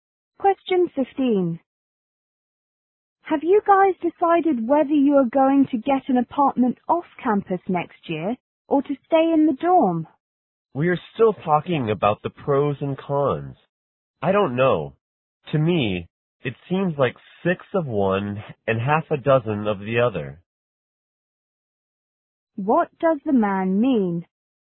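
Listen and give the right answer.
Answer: Both options are about the same.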